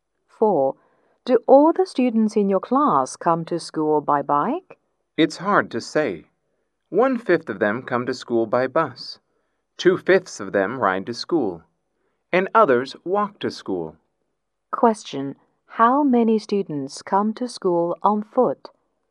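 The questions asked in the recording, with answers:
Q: How many students come to school on foot?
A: Two fifths of them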